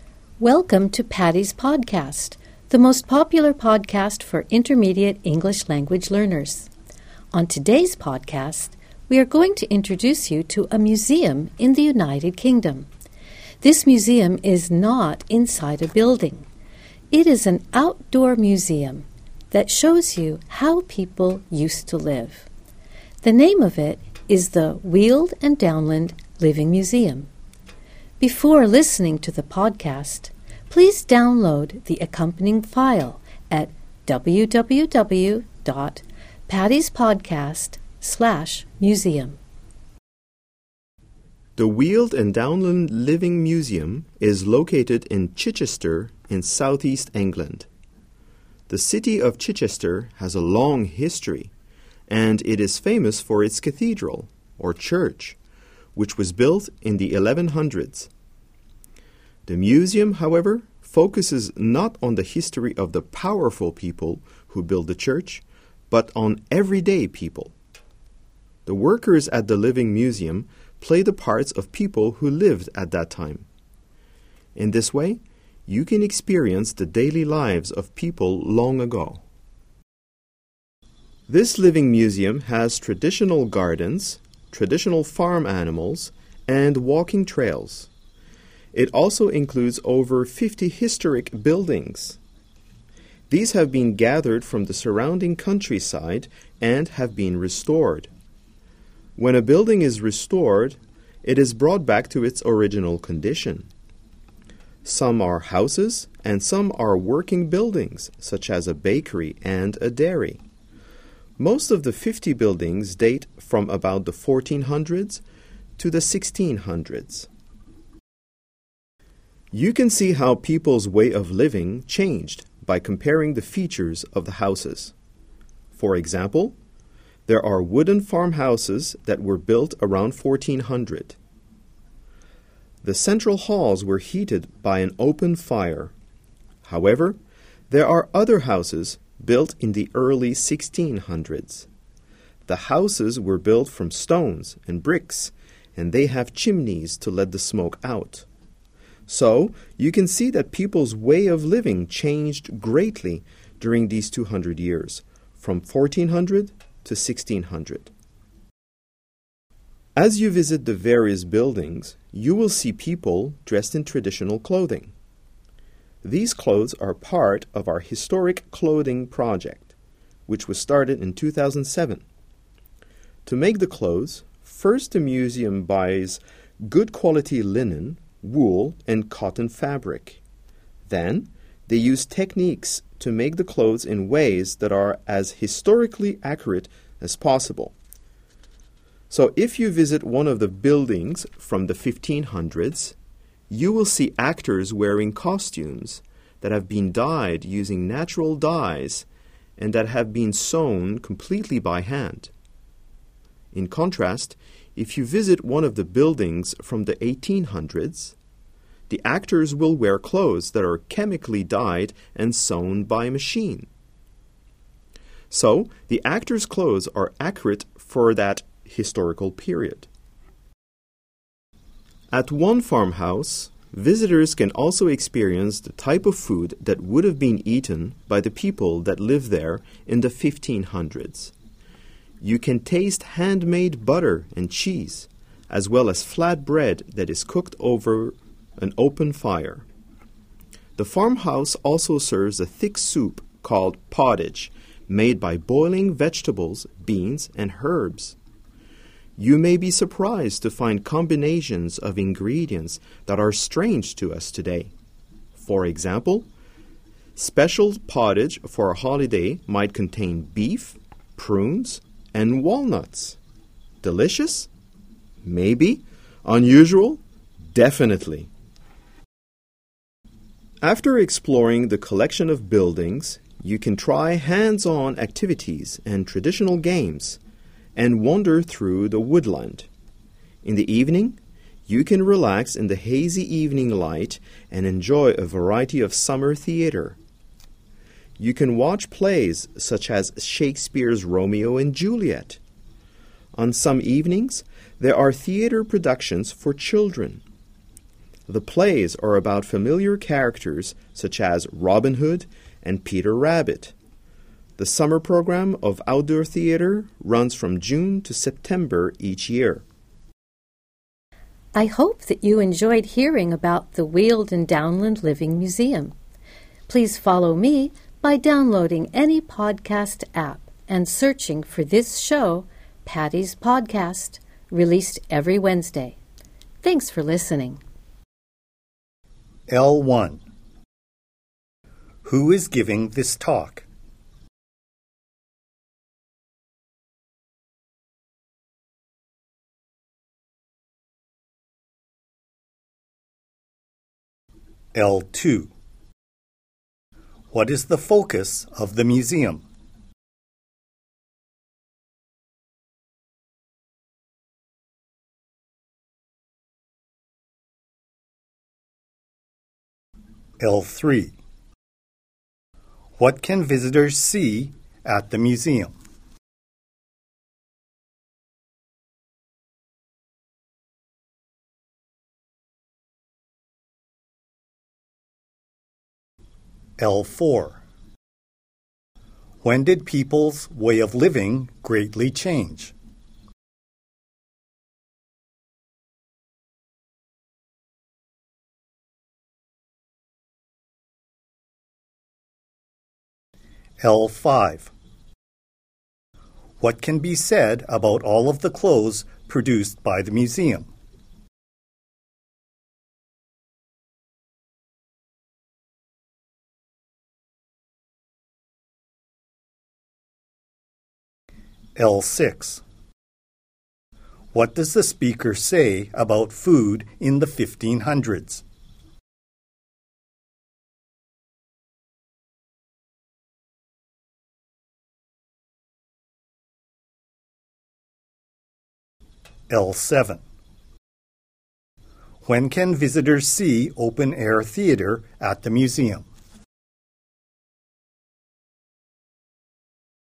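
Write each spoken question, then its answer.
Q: What is the focus of the museum?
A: The everyday lives of ordinary people long ago

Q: When did people's way of living greatly change?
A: Between 1400 and 1600

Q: What can be said about all of the clothes produced by the museum?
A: They are made to be as historically accurate as possible

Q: When can visitors see open-air theater at the museum?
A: On summer evenings, from June to September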